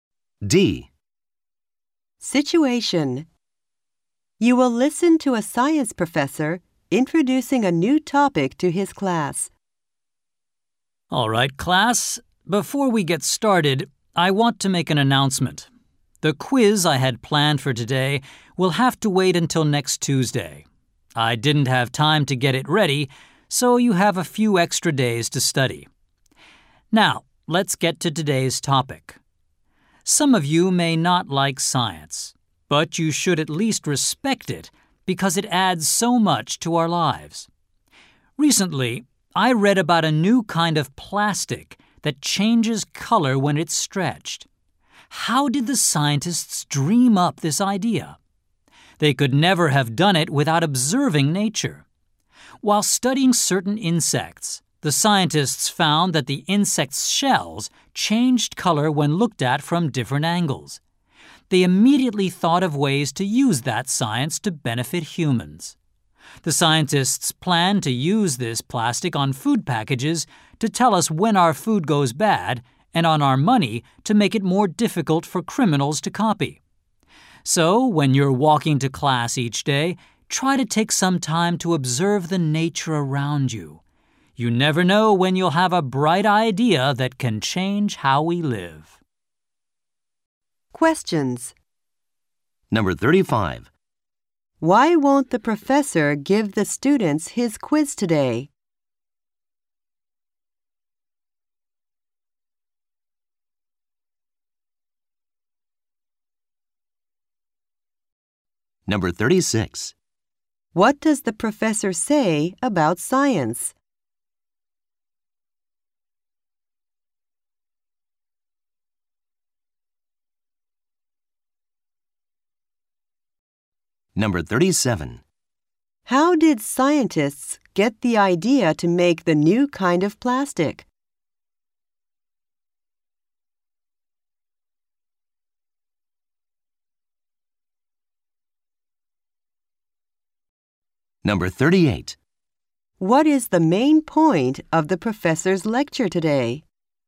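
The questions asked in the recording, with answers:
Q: Why won't the professor give the students his quiz today?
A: He didn't have time to get it ready

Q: What does the professor say about science?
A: It adds so much to our lives, so it should be respected

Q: How did scientists get the idea to make the new kind of plastic?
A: By observing insects whose shells change color from different angles

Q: What is the main point of the professor's lecture today?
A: Observing nature can lead to ideas that change how we live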